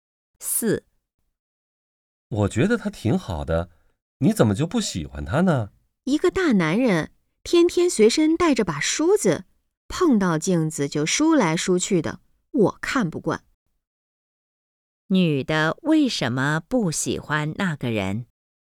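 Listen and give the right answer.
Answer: 他天天随身带着梳子,碰到镜子就梳头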